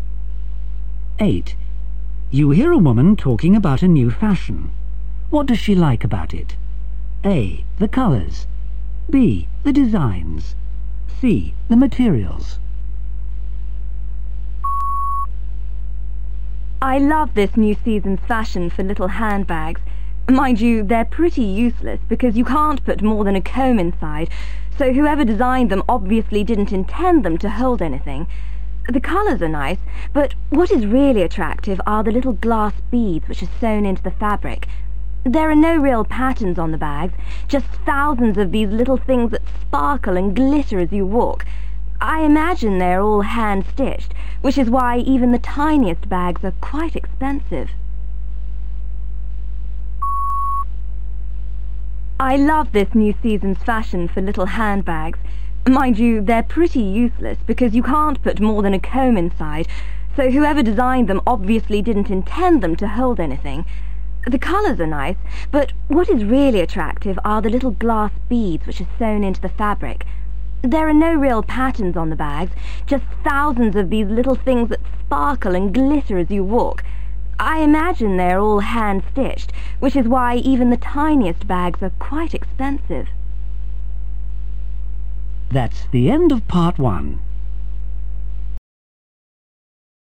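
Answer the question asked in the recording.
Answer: C: The materials.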